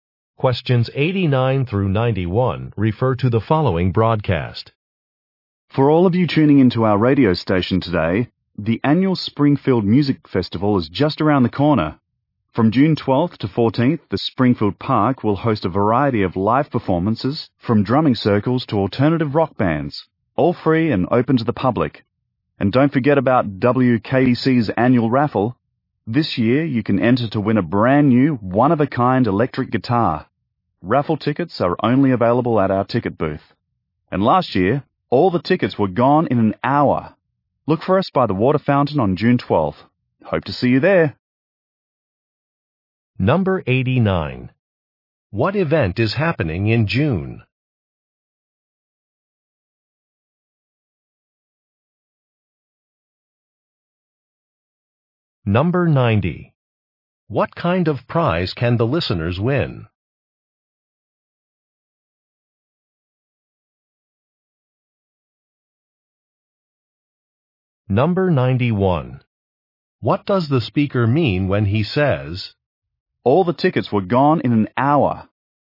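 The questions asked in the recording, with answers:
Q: What event is happening in June?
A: A music festival

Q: What kind of prize can the listeners win?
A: An electric guitar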